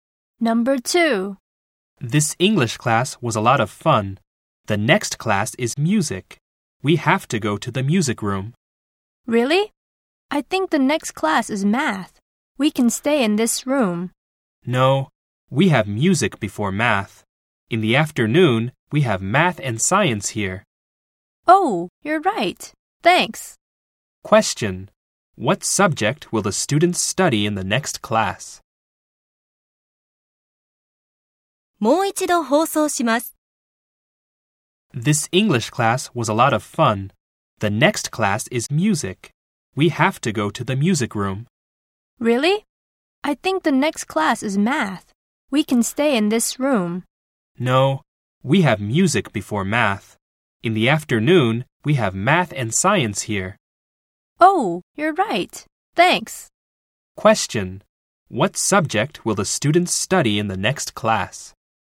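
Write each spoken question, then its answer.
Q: What subject will the students study in the next class?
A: Music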